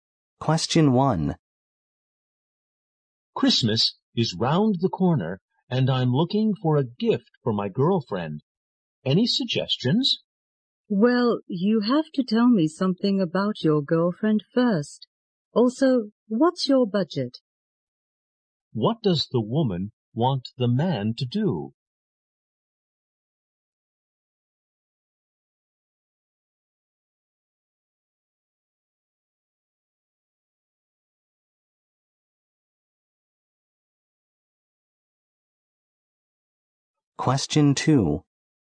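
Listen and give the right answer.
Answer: Tell her about his girlfriend and his budget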